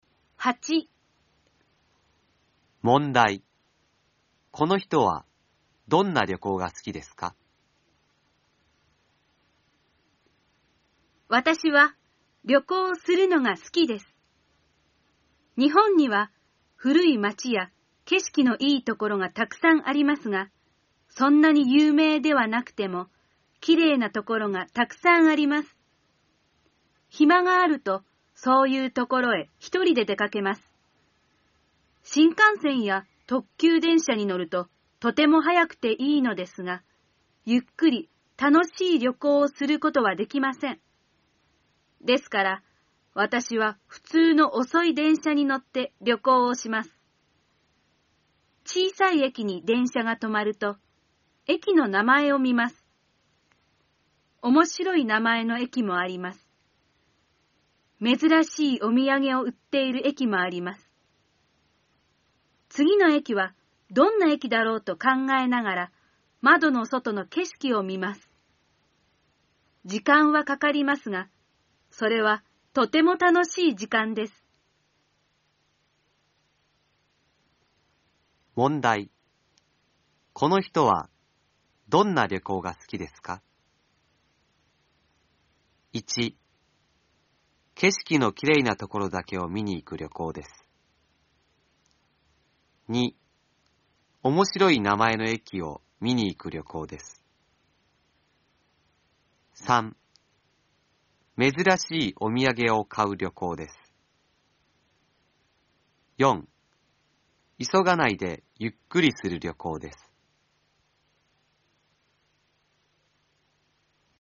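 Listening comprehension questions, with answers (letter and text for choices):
この人は、どんな旅行がすきですか。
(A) けしきのきれいなところだけを見に行く旅行です。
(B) おもしろい名前の駅を見に行く旅行です。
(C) めずらしいおみやげを買う旅行です。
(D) いそがないでゆっくりする旅行です。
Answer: (D) いそがないでゆっくりする旅行です。

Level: N4 ĐỀ 2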